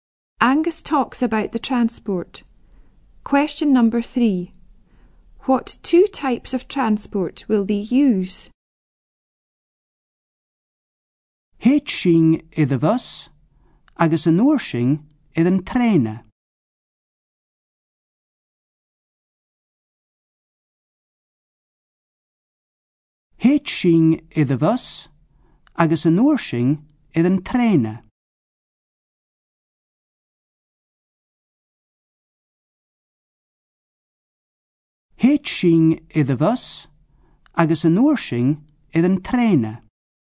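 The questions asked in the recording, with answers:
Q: What 2 types of transport will they use?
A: Bus, then train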